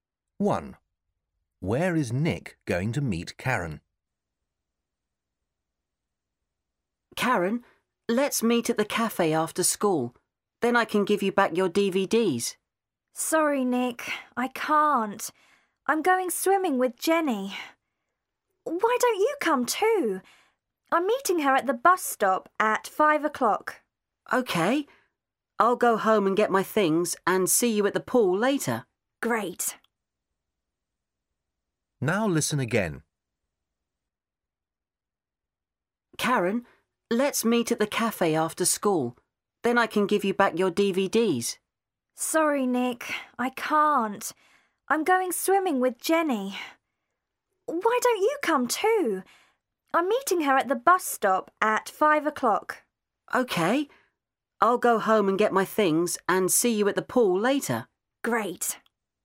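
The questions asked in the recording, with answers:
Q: Where is Nick going to meet Karen?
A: at the swimming pool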